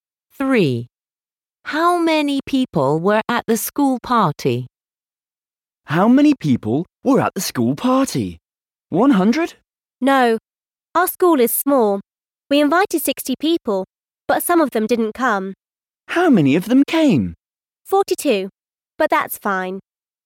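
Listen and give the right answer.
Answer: 42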